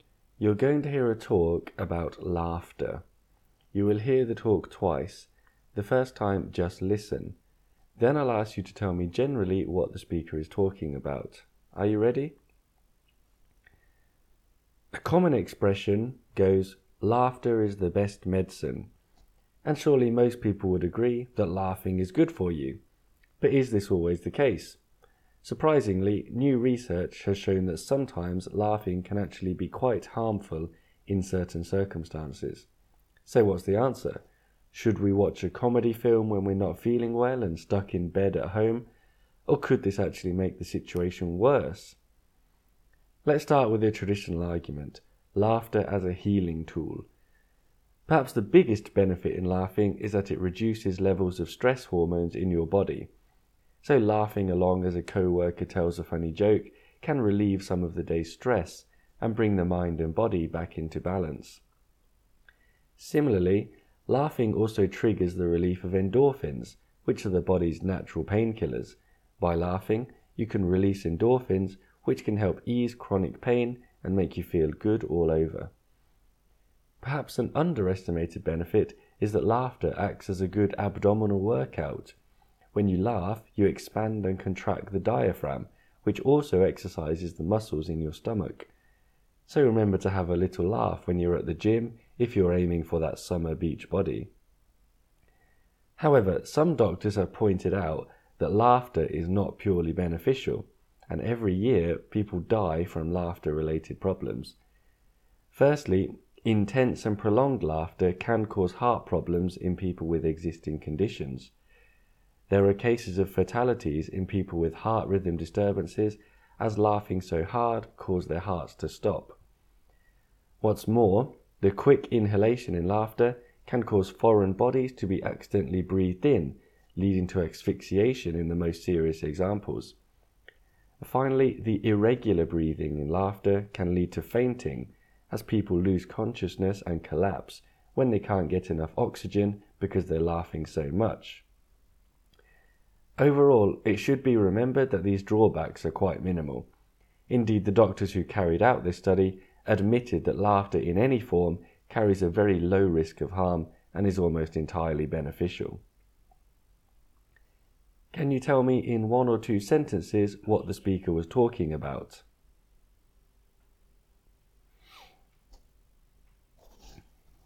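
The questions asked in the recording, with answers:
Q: Can you tell me in one or two sentences what the speaker was talking about?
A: The benefits and risks of laughing: it is mostly good for you, but it can sometimes be harmful.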